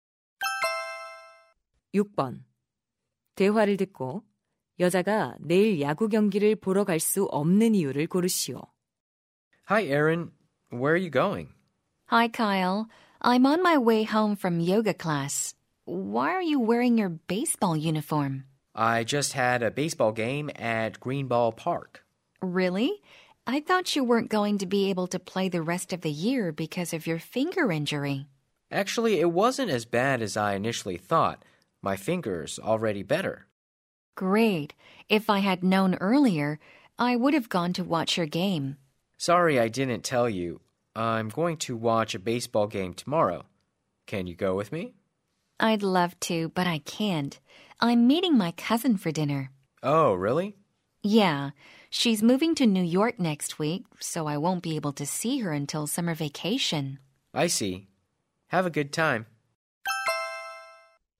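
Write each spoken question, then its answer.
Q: 대화를 듣고 여자가 내일 야구 경기를 보러 갈 수 없는 이유를 고르시오.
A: 사촌과 저녁 식사를 하기로 해서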